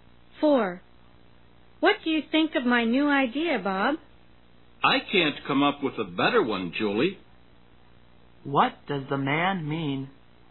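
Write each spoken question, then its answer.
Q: What does the man mean?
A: Julie's idea is the best; he can't think of a better one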